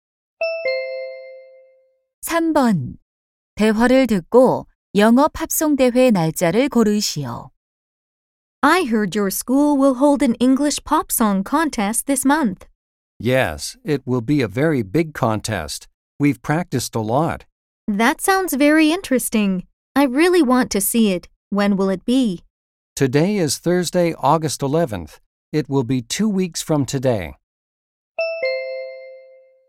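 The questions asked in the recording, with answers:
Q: 대화를 듣고 영업 합성 대회 날짜를 고르시오.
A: 8월 25일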